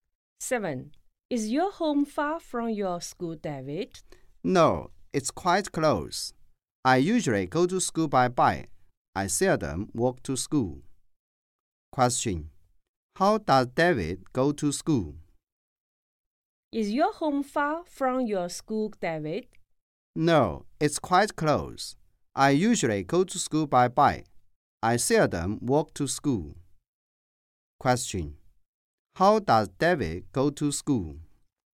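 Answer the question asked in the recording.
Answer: By bike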